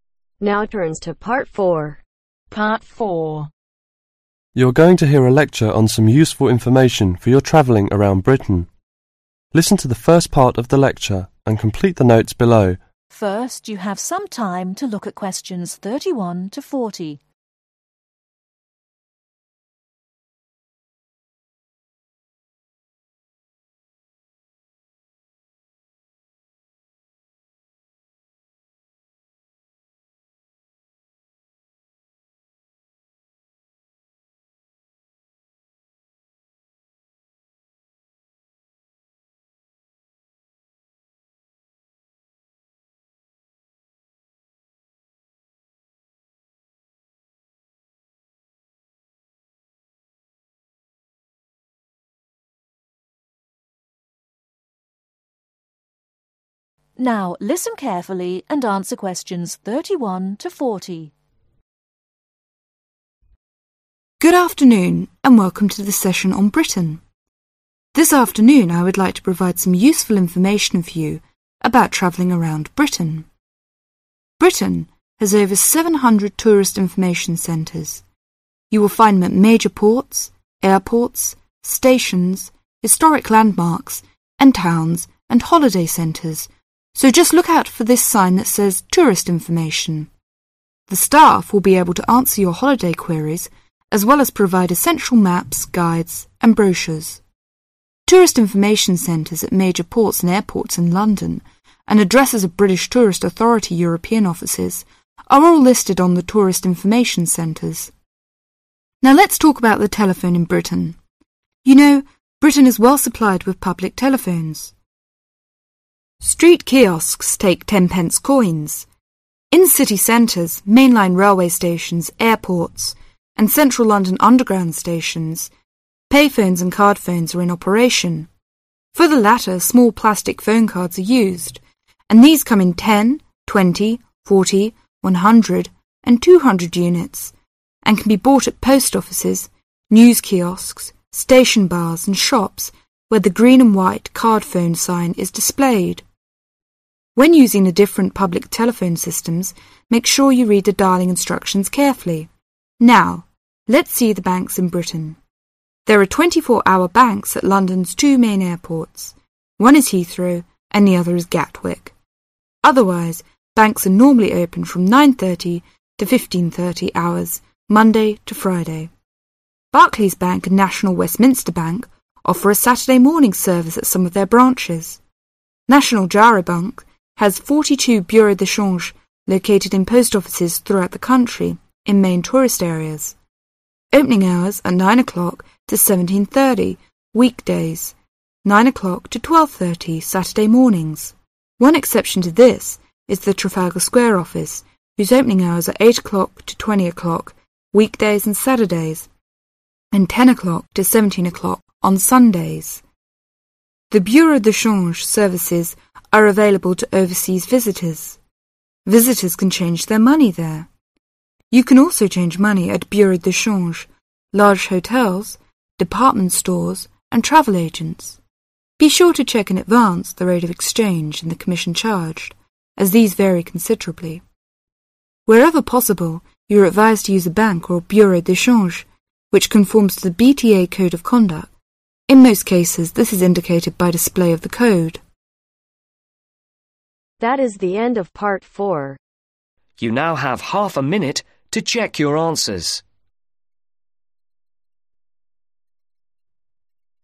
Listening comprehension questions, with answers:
Complete the notes below. Write ONE WORD ONLY for each answer.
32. 32............. Landmarks and towns and holiday centres.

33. One is 33. ........... and the other is card-phones.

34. For the latter ones, You can buy at post 34..........., news kiosks,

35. station bars and 35...............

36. Bank are normally open from 9:30 to 15:30 Monday to 36............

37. But at London's two main 37............ three are 34-hour banks.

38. Trafalgar Square Office opens from 8:00 to 20:00 weekdays and 38............... on Sunday,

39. The bureau de charge services are available to overseas 39................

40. You can also change money at Bureau de change, Large hotels, 40........... stores and travel agents.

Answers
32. Historic
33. Payphones
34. Offices
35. Shops
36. Friday
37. Airports
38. Saturdays
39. Visitors
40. Department